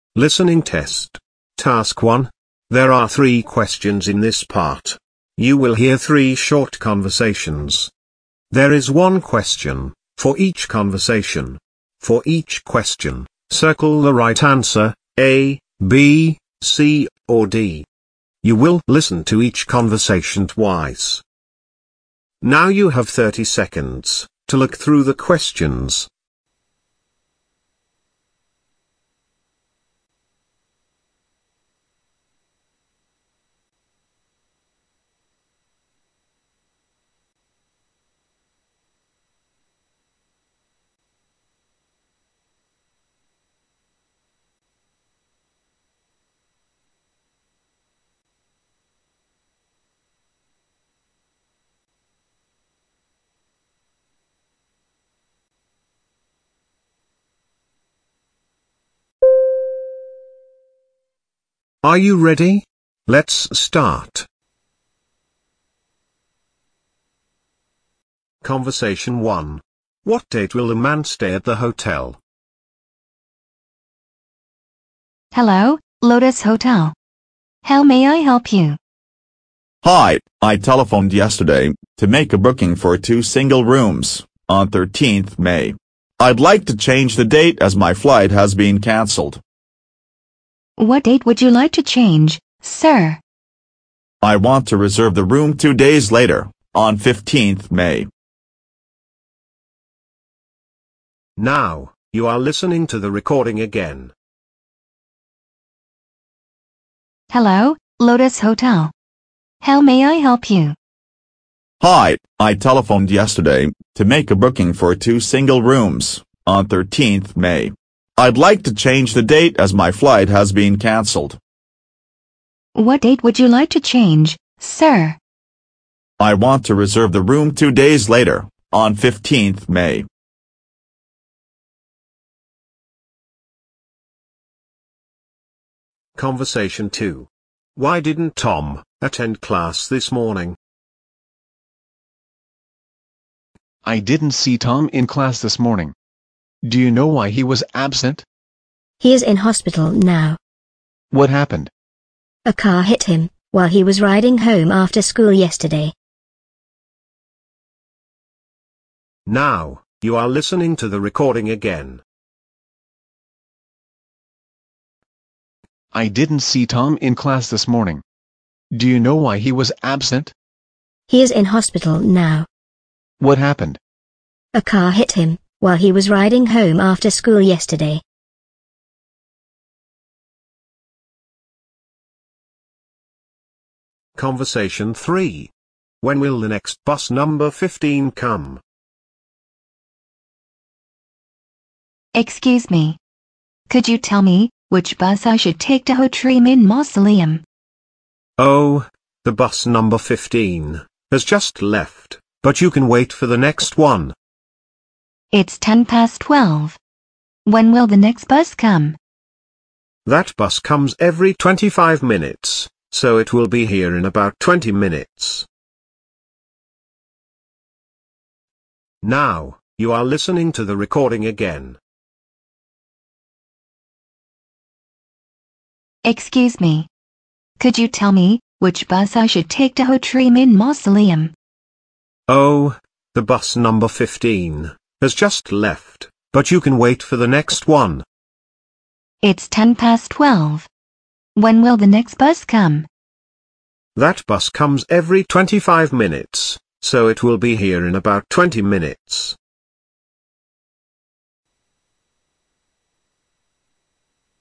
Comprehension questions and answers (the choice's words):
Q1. What date will the man stay at the hotel?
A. 13th May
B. 30th May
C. 15th May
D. 31st May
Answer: 15th May

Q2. Why didn't Tom attend class this morning?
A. His car hit a bike.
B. He was ill.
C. He had an accident.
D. He had to work in the hospital.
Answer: He had an accident.

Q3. When will the next bus Number 15 come?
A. 12.20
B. 12.25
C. 12.30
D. 12.35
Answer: 12.30

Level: lớp 10